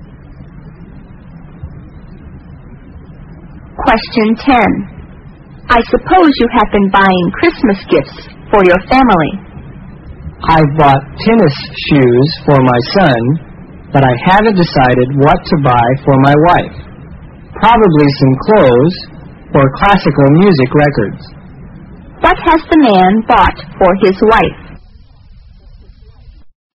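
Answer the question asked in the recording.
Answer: Nothing yet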